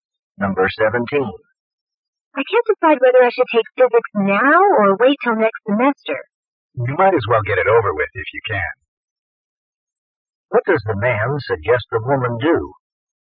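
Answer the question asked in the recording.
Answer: Take physics now.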